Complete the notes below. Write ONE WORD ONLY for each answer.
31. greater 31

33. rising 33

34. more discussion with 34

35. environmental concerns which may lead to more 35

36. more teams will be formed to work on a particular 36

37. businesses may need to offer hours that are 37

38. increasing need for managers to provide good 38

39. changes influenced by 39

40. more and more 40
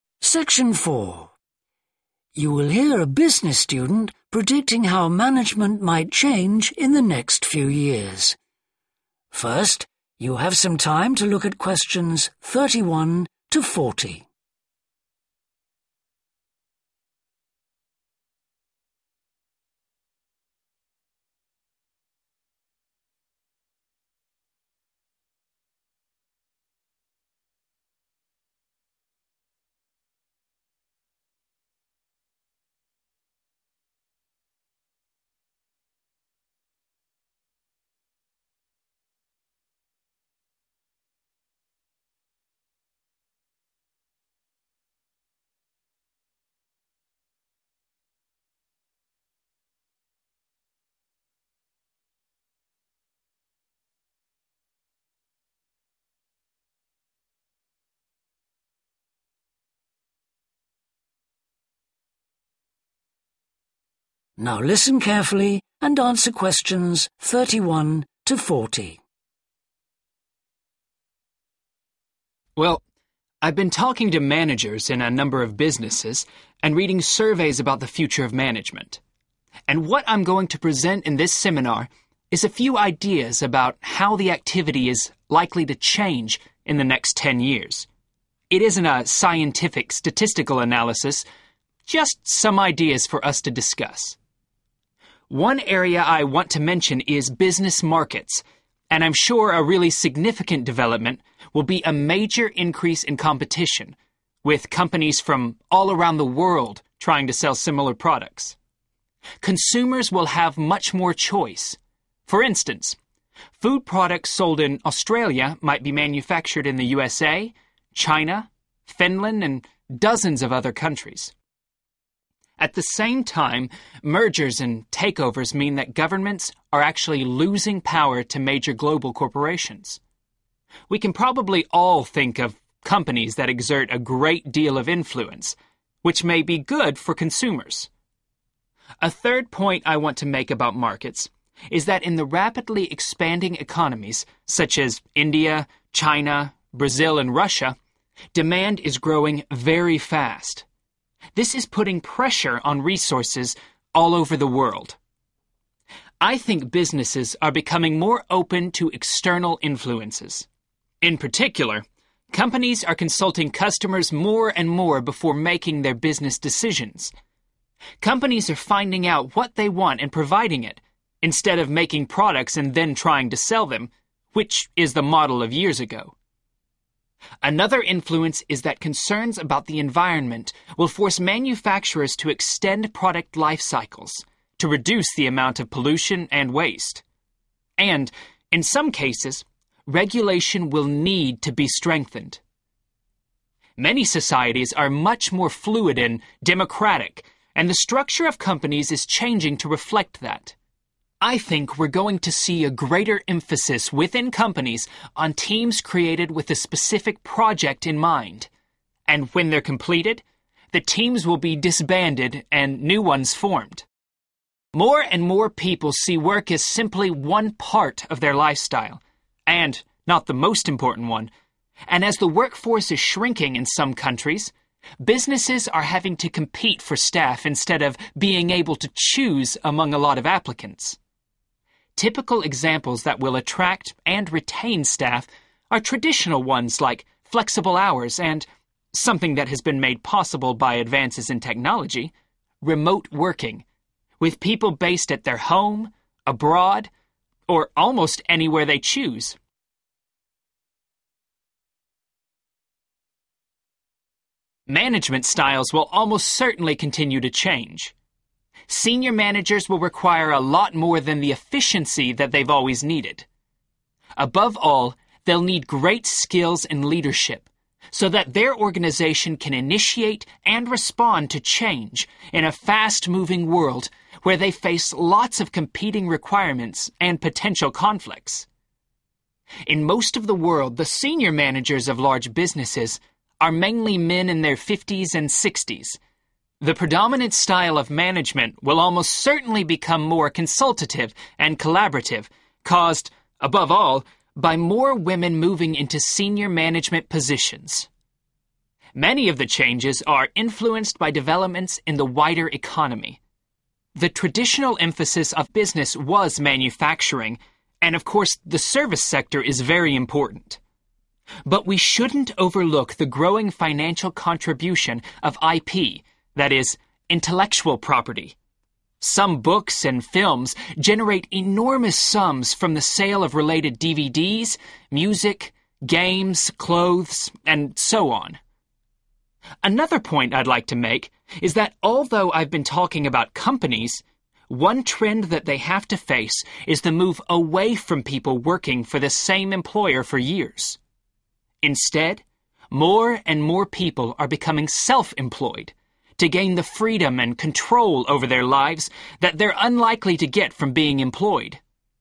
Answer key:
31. competition
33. demand
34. customers
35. regulation
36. project
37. flexible
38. leadership
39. women
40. self-employed